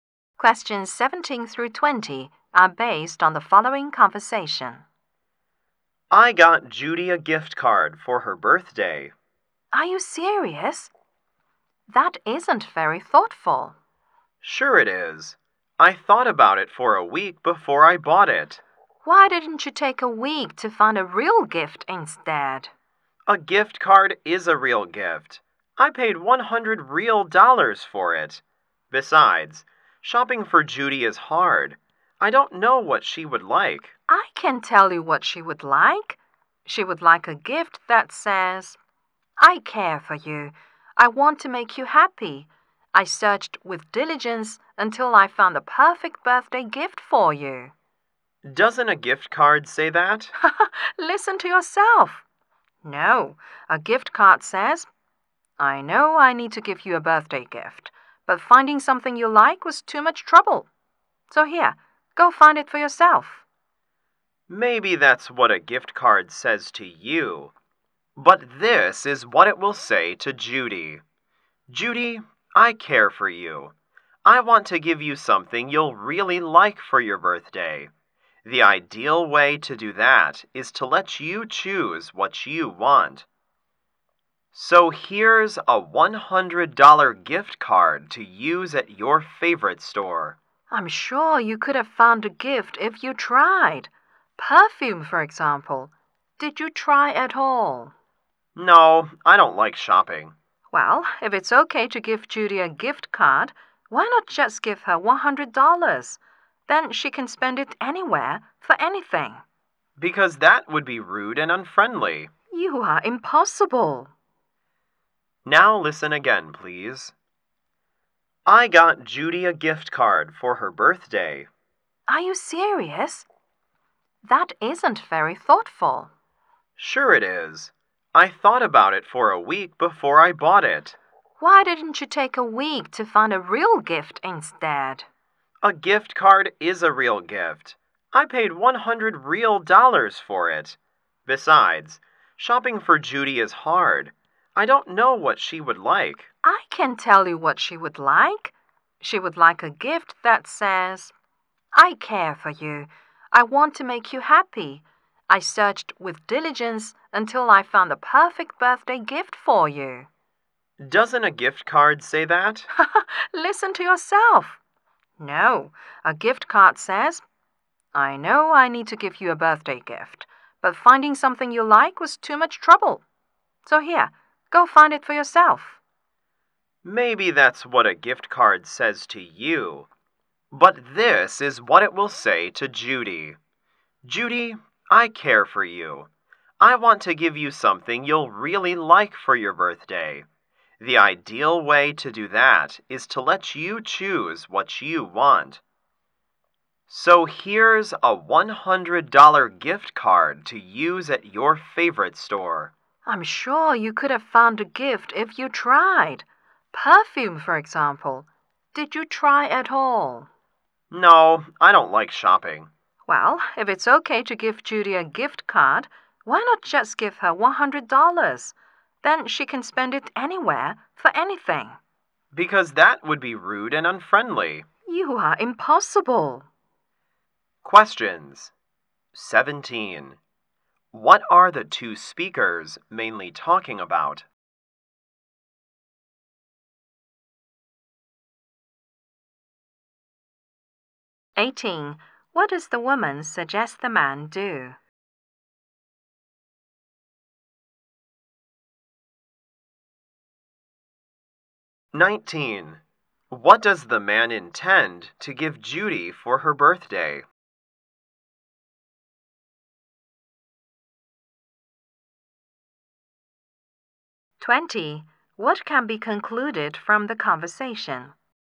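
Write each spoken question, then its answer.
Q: What are the two speakers mainly talking about?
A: Whether a gift card is a good birthday gift for Judy

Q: What does the woman suggest the man do?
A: Take the time to find a real gift, such as perfume

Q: What does the man intend to give Judy for her birthday?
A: A $100 gift card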